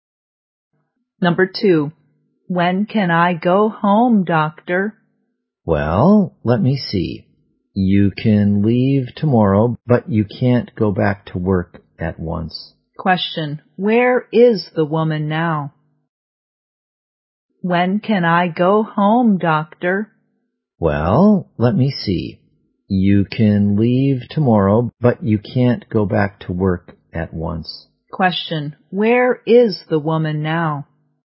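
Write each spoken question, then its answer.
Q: where is the woman now?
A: In the hospital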